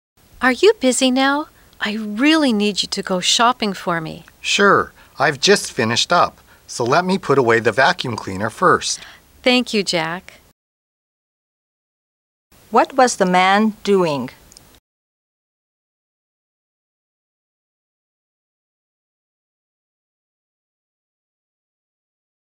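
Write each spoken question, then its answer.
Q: What was the man doing?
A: Vacuuming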